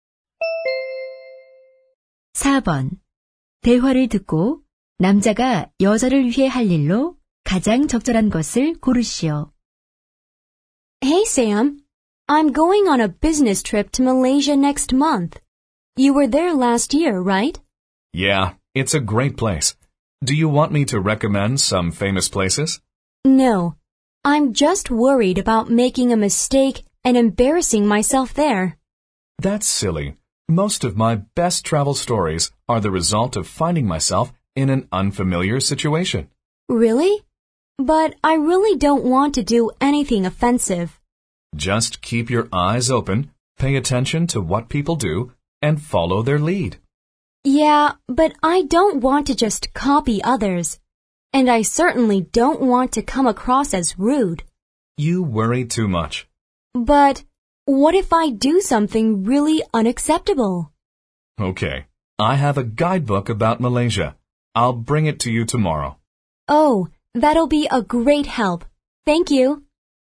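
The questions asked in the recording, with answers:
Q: 대화를 듣고 남자가 여자를 위해 할 일로 가장 적절한 것을 고르시오.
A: 말레이시아 안내 책자 가져다주기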